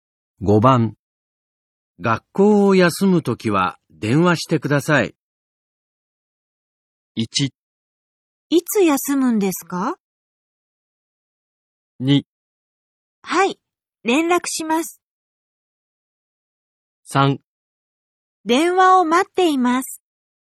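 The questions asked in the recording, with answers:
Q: 学校を休むときは電話してください。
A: 2: はい、連絡します。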